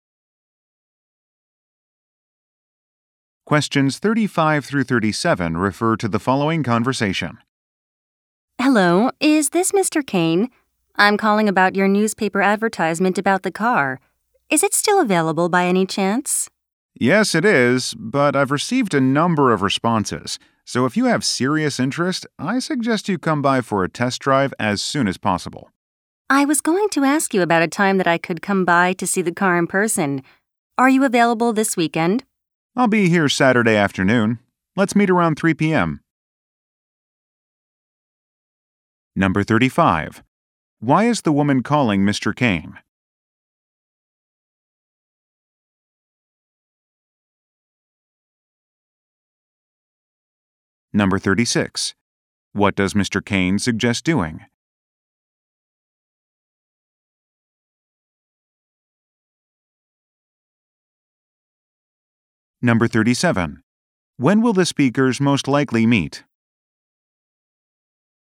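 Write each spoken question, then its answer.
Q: Why is the woman calling Mr. Kane?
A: To ask about the car in his newspaper advertisement

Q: What does Mr. Kane suggest doing?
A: Coming by for a test drive soon

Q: When will the speakers most likely meet?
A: Saturday around 3 p.m.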